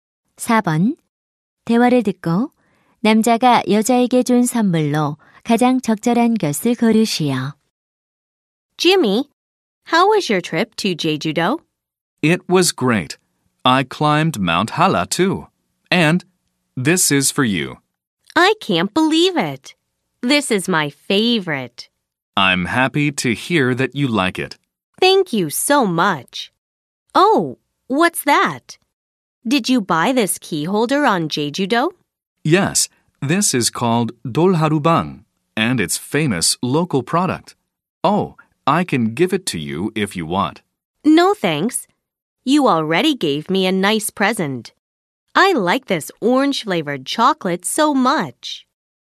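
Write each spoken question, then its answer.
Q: 대화를 듣고 남자가 여자에게 준 선물로 가장 적절한 것을 고르시오.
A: 오렌지 맛 초콜릿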